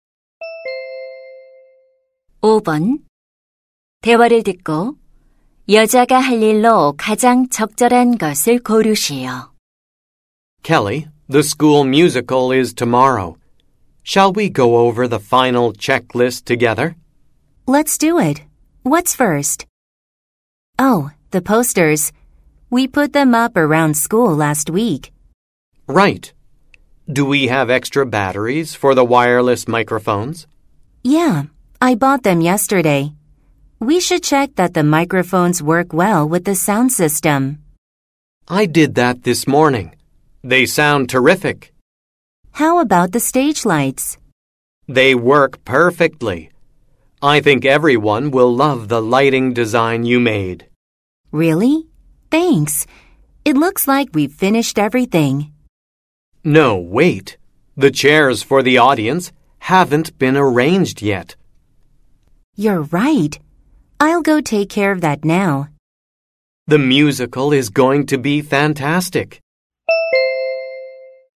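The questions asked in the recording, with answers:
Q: 대화를 듣고 여자가 할 일로 가장 적절한 것을 고르시오.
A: 관객용 의자 배치하기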